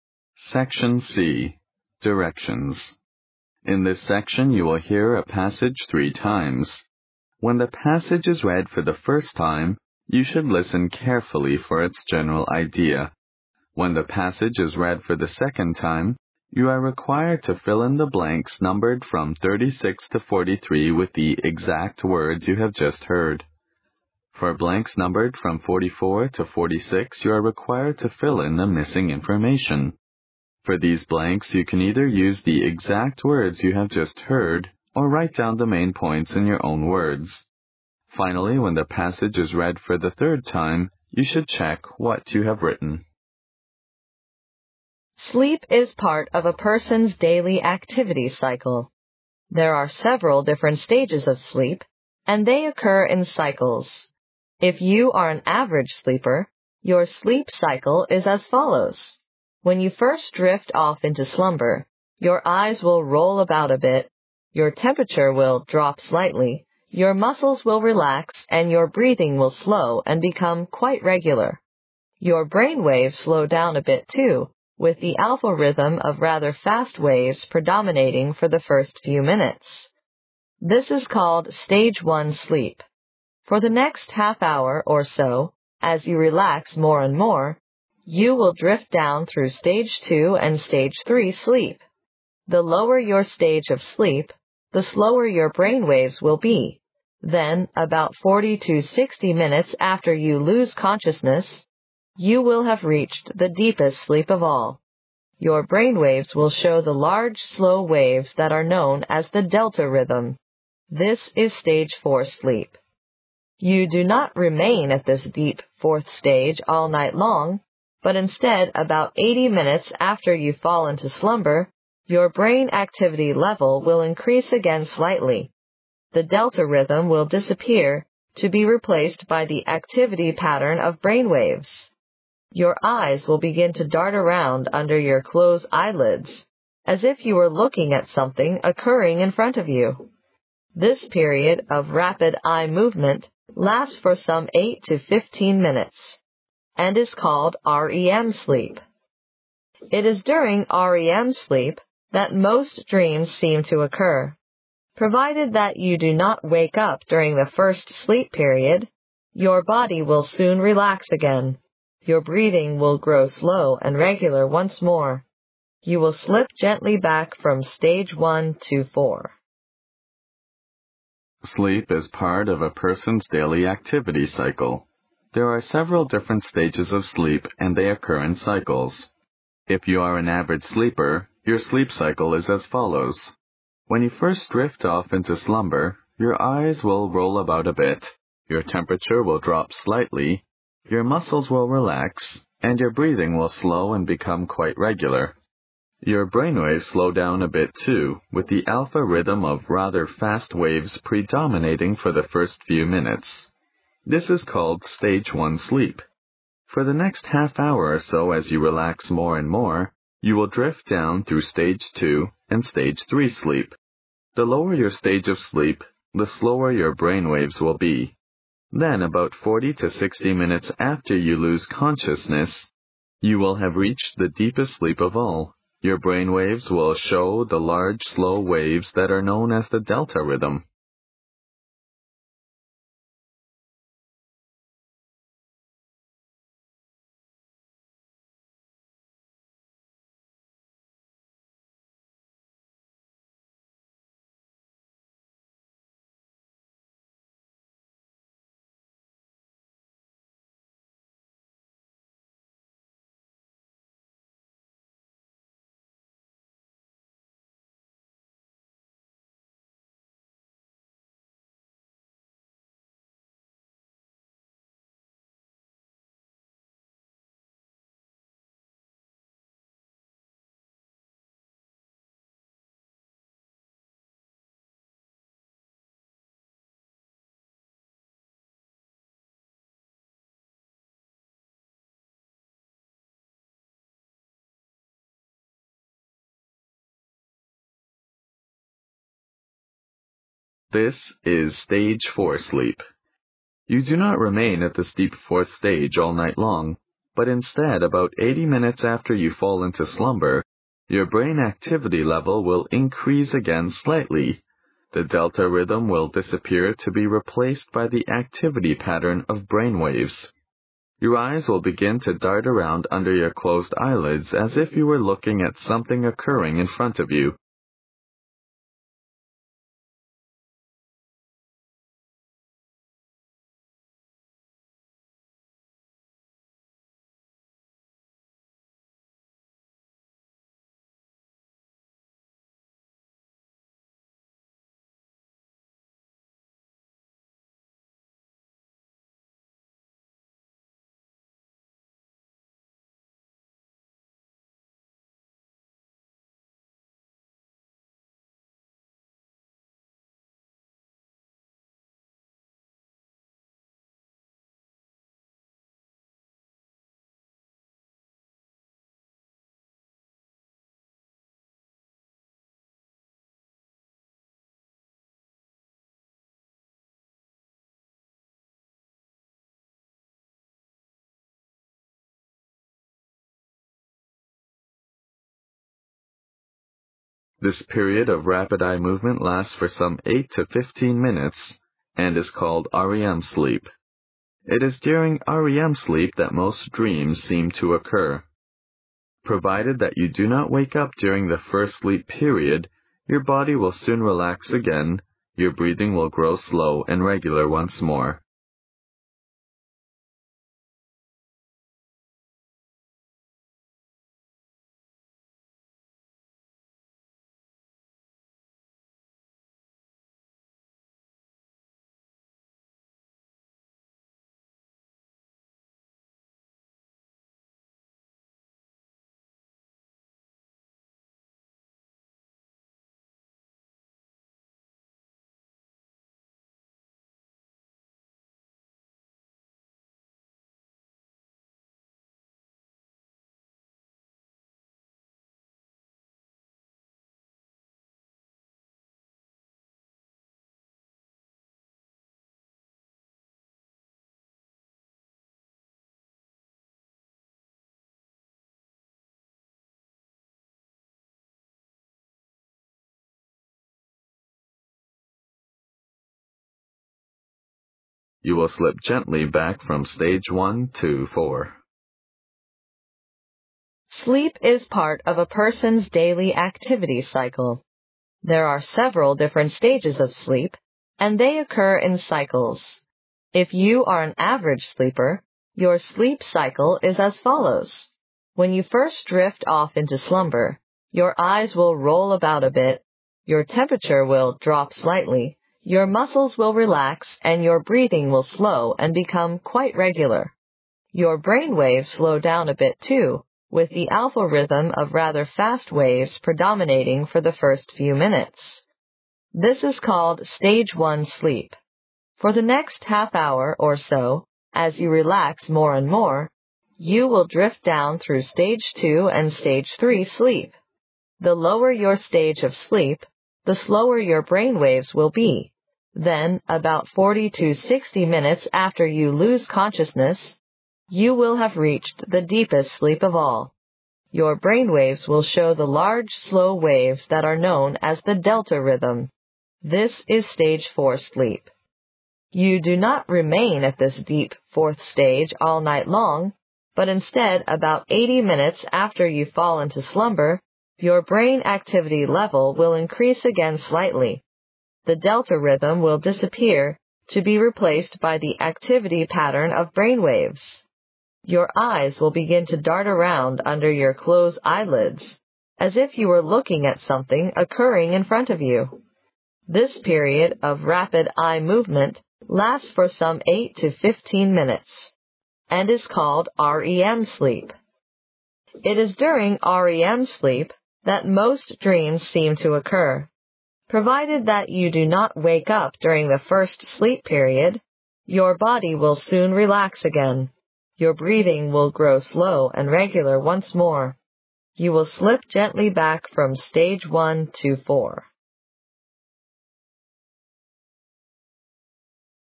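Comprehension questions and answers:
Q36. Sleep is part of a person's daily __36__ cycle.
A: activity

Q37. If you are an ___37___ sleeper, your sleep cycle is as follows.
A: average

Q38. your _____38_____ will drop slightly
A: temperature

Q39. your ___39__ will relax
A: muscles

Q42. with the alpha rhythm of rather fast waves ____42____ for the first few minutes.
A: predominating

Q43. Then about 40 to 60 minutes after you lose _____43____ you will have reached the deepest sleep of all.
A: consciousness

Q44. ________________________________________44__________________________________. This is stage 4 sleep.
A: Your brain waves will show the large, slow waves that are known as the delta rhythm

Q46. ______________________46________________ .You will slip gently back from stage I to 4.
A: Provided that you do not wake up during the first sleep period, your body will soon relax again. Your breathing will grow slow and regular once more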